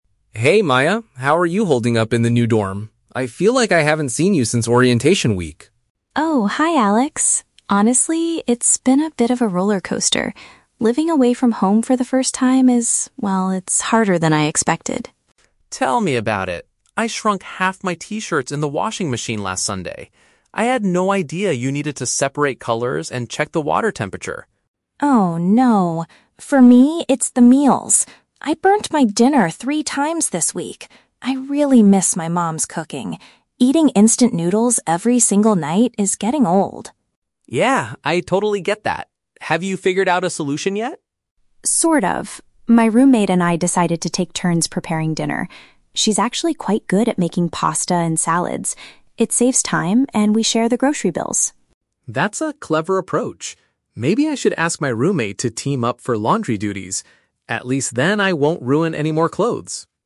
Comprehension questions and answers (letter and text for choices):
Listen to the conversation between two university students and choose the correct answer (A, B, or C) for each question.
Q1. What was Alex's main problem during his first week in the dorm?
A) He accidentally damaged his clothing.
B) He had to purchase a new washing machine.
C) He did not know how to prepare his own food.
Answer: A) He accidentally damaged his clothing.

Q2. Why is Maya unhappy with her current diet?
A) She misses eating at fancy restaurants with her family.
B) She is tired of having the same quick convenience food.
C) She spends too much money buying ingredients at the supermarket.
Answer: B) She is tired of having the same quick convenience food.

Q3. How did Maya solve her daily struggle?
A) She learned how to cook pasta by watching videos online.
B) She asked her mother to send some homemade meals.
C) She agreed to share the household responsibilities with someone else.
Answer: C) She agreed to share the household responsibilities with someone else.

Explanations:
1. Alex says, "I shrunk half my t-shirts in the washing machine." Option A paraphrases "shrunk half my t-shirts" as "damaged his clothing." The Trap: Option (C) is a trap. Struggling to prepare food is Maya's problem, not Alex's. Option (B) contains the keyword "washing machine," but he didn't buy a new one.
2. Maya states that "Eating instant noodles every single night is getting old." The phrase "getting old" means becoming boring or tiring, and "instant noodles" is paraphrased as "quick convenience food." The Trap: Option (A) is a trap. She mentions missing her "mom's cooking," not eating at "fancy restaurants." Option (C) is plausible, but in the audio, she mentions sharing grocery bills as a benefit of her solution, not that she was spending too much before.
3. Maya says, "My roommate and I decided to take turns preparing dinner." Option C paraphrases this as "share the household responsibilities with someone else." The Trap: Option (A) is a trap because the audio mentions "making pasta," but it's the roommate who is good at it, not Maya learning it online. Option (B) is a logical guess for a student who misses home, but it is not mentioned.

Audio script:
Alex: Hey Maya, how are you holding up in the new dorm? I feel like I haven't seen you since orientation week.
Maya: Oh, hi Alex! Honestly, it's been a bit of a rollercoaster. Living away from home for the first time is... well, it's harder than I expected.
Alex: Tell me about it! I shrunk half my t-shirts in the washing machine last Sunday. I had no idea you needed to separate colors and check the water temperature.
Maya: Oh no! For me, it's the meals. I burnt my dinner three times this week. I really miss my mom's cooking. Eating instant noodles every single night is getting old.
Alex: Yeah, I totally get that. Have you figured out a solution yet?
Maya: Sort of. My roommate and I decided to take turns preparing dinner. She's actually quite good at making pasta and salads. It saves time, and we share the grocery bills.
Alex: That's a clever approach. Maybe I should ask my roommate to team up for laundry duties. At least then I won't ruin any more clothes!